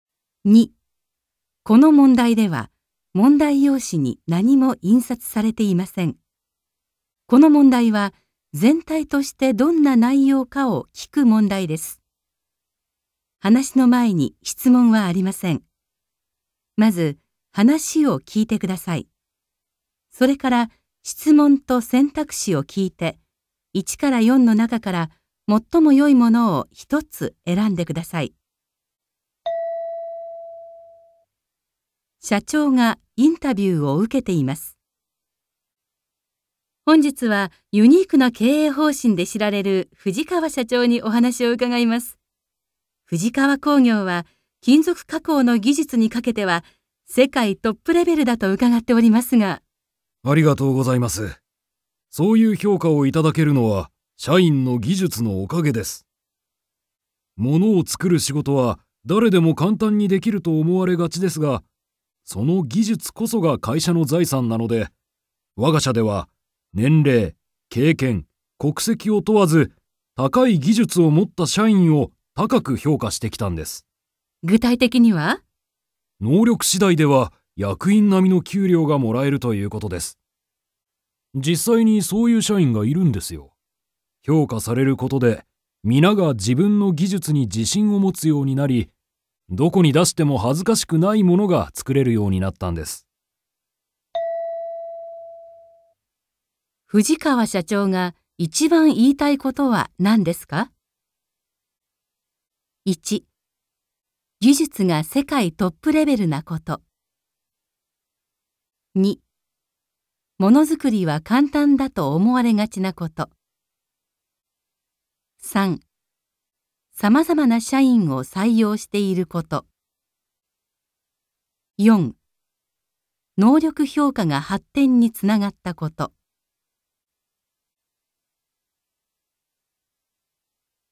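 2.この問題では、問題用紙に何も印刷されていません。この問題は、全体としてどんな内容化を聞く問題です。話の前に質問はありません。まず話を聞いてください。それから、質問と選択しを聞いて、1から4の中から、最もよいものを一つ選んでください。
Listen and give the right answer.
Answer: 能力評価が発展につながったこと

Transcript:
社長がインタビューを受けています。
F: 本日はユニークな経営方針で知られる藤川社長にお話を伺います。藤川工業は、 金属加工の技術にかけては世界トップレベルだと伺っておりますが・・・。
M: ありがとうございます。そういう評価をいただけるのは社員の技術のおかげです。物を作る仕事は誰でも簡単にできると思われがちですが、その技術こそが会社の財産なので、わが社では年齢、経験、国籍を問わず、高い技術を持った社員を高く評価してきたんです。
F: 具体的には?
M: 能力次第では役員並みの給料がもらえるということです。実際にそういう社員がいるんですよ。評価されることで、皆が自分の技術に自信を持つようになり、どこに出しても恥ずかしくないものが作れるようになったんです。

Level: N2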